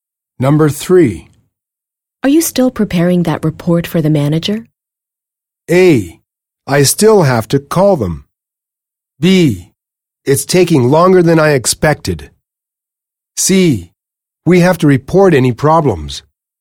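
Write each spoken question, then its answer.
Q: Are you still preparing that report for the manager?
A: B: It's taking longer than I expected.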